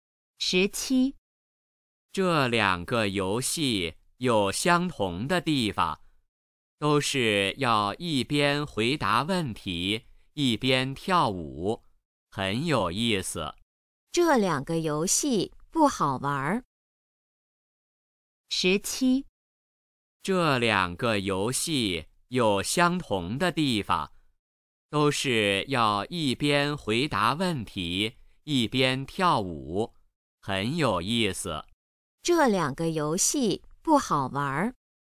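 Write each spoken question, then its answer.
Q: 这两个游戏不好玩。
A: 错(很有意思)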